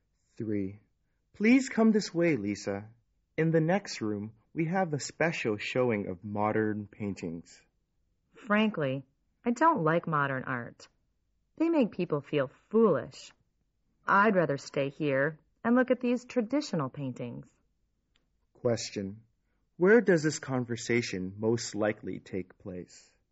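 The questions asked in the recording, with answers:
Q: Where does this conversation most likely take place?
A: In an art gallery or museum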